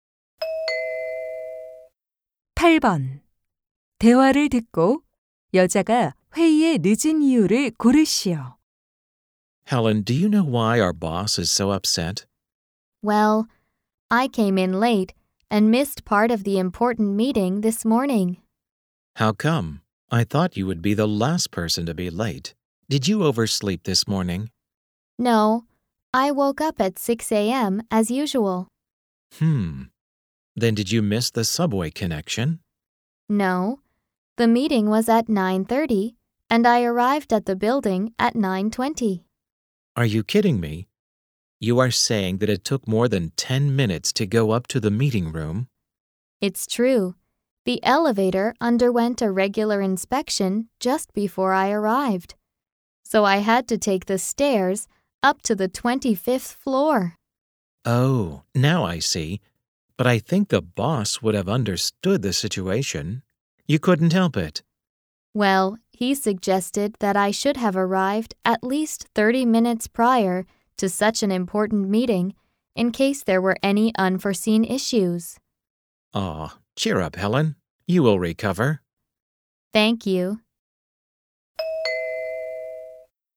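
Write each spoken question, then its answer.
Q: 대화를 듣고 여자가 회의에 늦은 이유를 고르시오.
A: 엘리베이터 정기 점검으로 계단을 이용해야 해서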